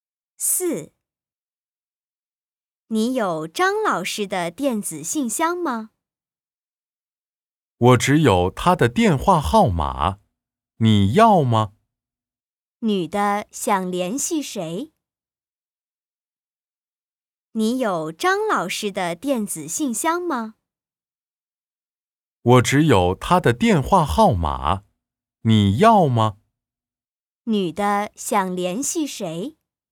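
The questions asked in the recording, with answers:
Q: 女的想联系谁?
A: 张老师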